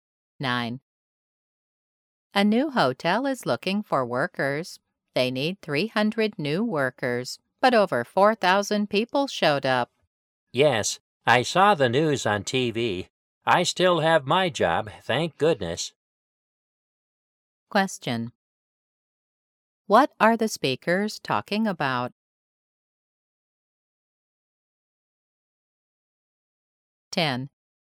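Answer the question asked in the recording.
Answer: Many people seeking few jobs at a new hotel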